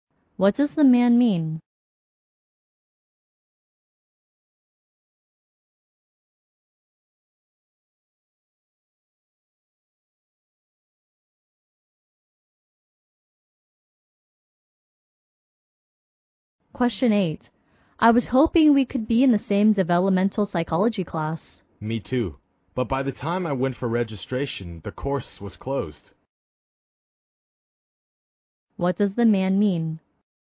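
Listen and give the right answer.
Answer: The course was already closed when he went to register.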